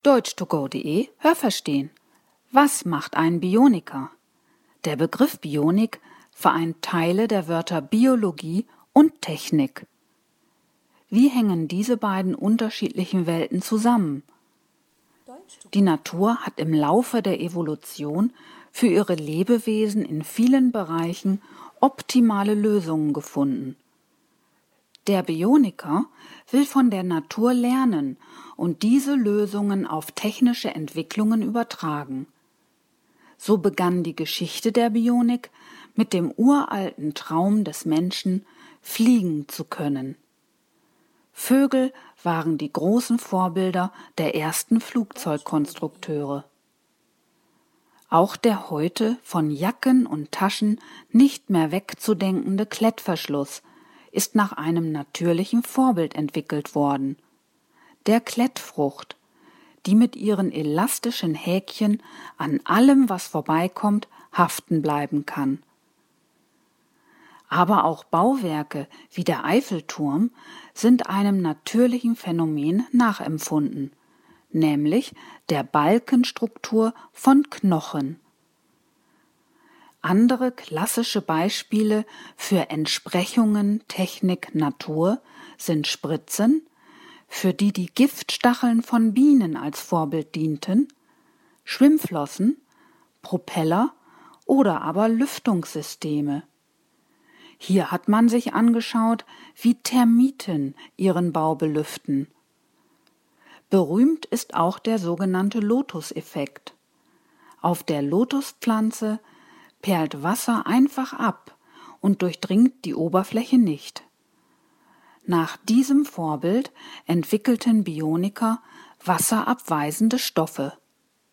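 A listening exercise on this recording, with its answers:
Was haben Sie gehört? Es gibt nur eine korrekte Antwort.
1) Der Begriff Bionik setzt sich aus _____ Biologie und Technik zusammen.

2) Die Natur hat im Laufe der Evolution _____ optimale Lösungen gefunden.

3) Die Geschichte der Bionik _____ , fliegen zu können.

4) Vorbild für den Klettverschluss war die Klettfrucht, die mit ihren elastischen _____ bleiben kann.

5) Auch Konstruktionen wie der Eiffelturm sind ....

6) Für Spritzen dienten die _____ als Vorbild.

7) Bioniker entwickelten nach dem Vorbild der Lotuspflanze ...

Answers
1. Teilen der Wörter
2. für ihre Lebewesen in vielen Bereichen
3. begann mit dem uralten Traum des Menschen
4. Häkchen an allem, was vorbeikommt, haften
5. der Balkenstruktur von Knochen nachempfunden
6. Giftstacheln von Bienen
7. wasserabweisende Stoffe

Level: Hörtexte C (schwer)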